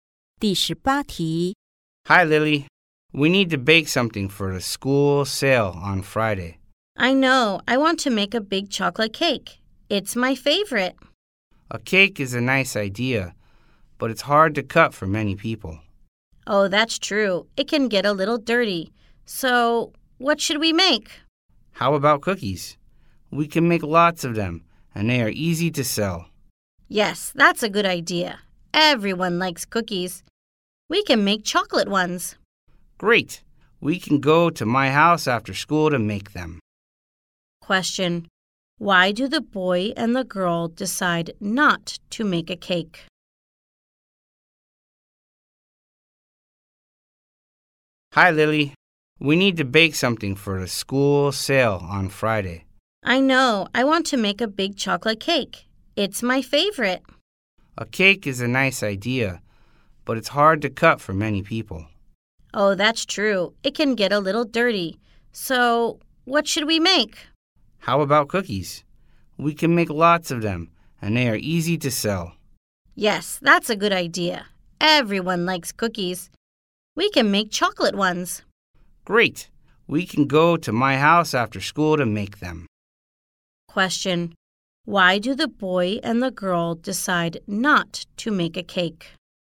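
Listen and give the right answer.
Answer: It's hard to cut for many people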